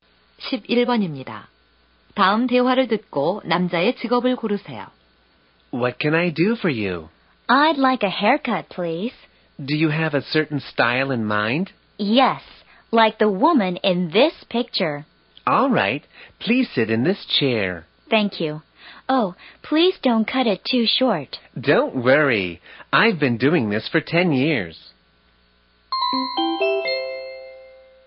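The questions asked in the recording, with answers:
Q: 다음 대화를 듣고 남자의 직업을 고르세요.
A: 미용사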